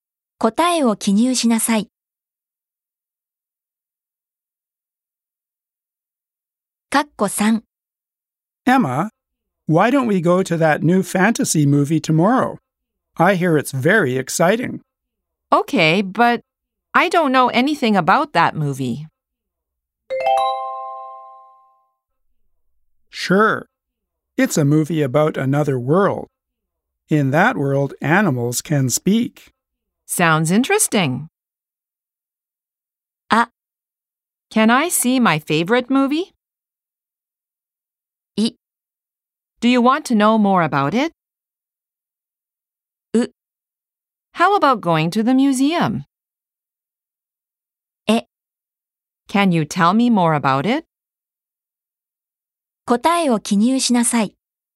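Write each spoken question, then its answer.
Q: Okay, but I don't know anything about that movie.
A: え: Can you tell me more about it?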